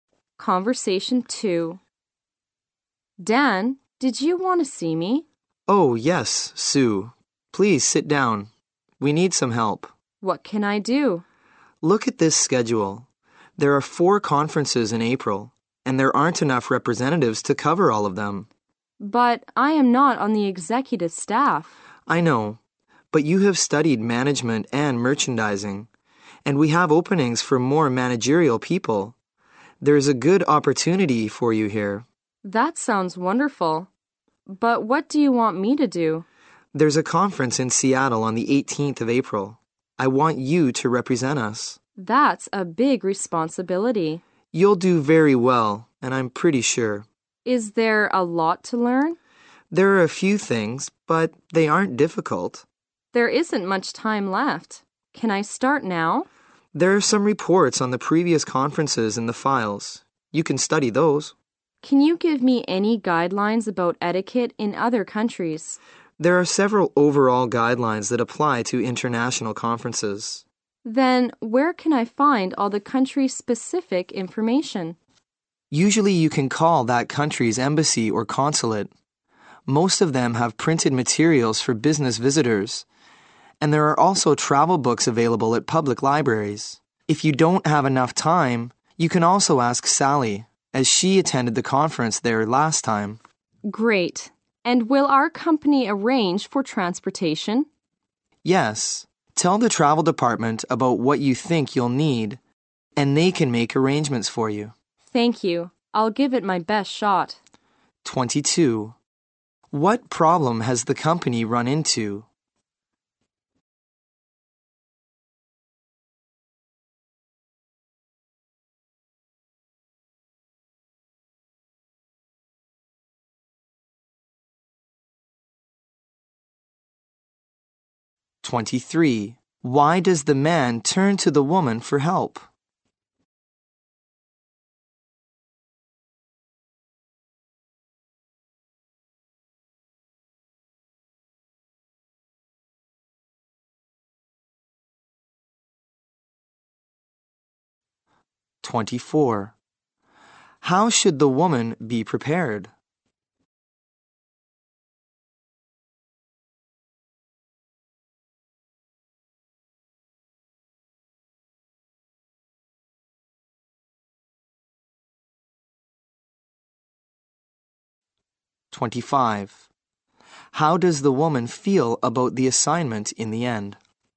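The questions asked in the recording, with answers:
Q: What problem has the company run into?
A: There aren't enough representatives to cover four conferences in April.

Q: Why does the man turn to the woman for help?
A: She has studied management and merchandising.

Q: How does the woman feel about the assignment in the end?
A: Willing and determined to do her best.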